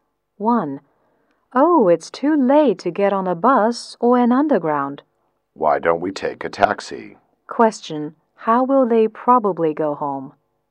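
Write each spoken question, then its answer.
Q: How will they probably go home?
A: By taxi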